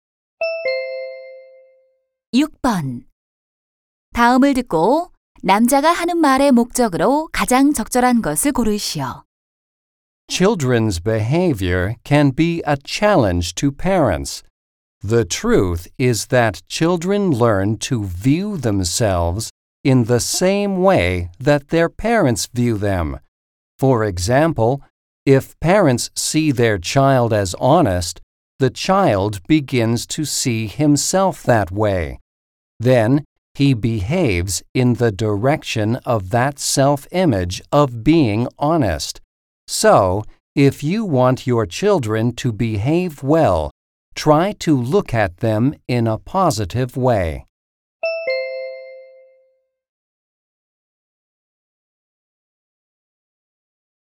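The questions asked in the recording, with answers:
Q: 다음을 듣고 남자가 하는 말의 목적으로 가장 적절한 것을 고르시오.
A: 자녀를 긍정적으로 바라보도록 조언하려고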